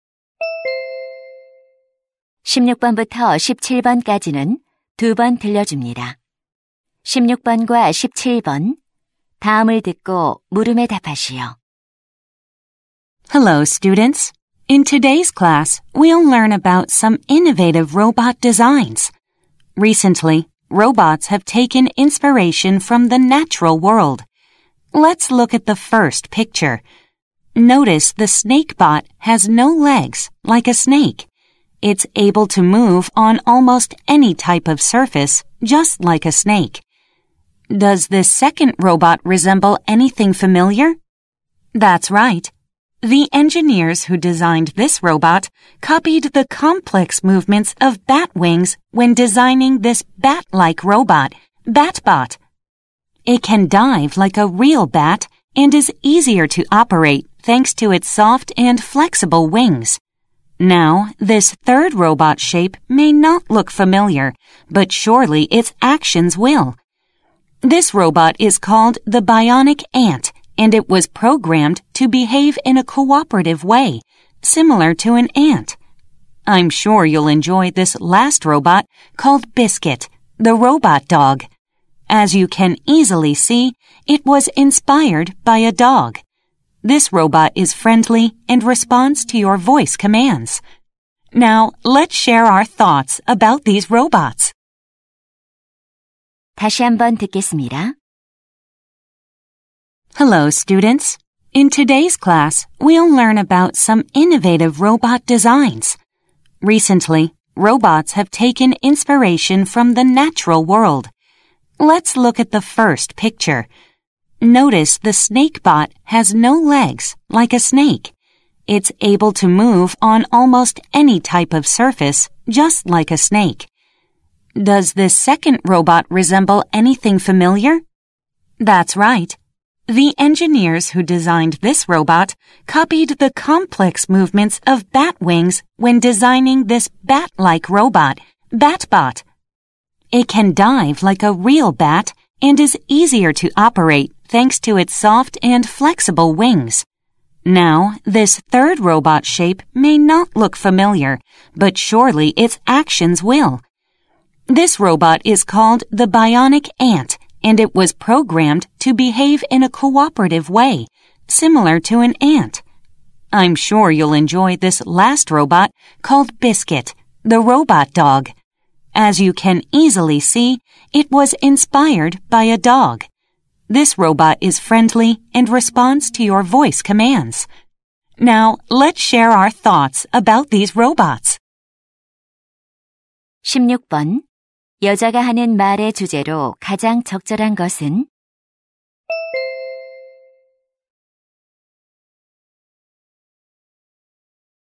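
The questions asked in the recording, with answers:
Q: 여자가 하는 말의 주제로 가장 적절한 것은?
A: 자연에서 영감을 받은 로봇 디자인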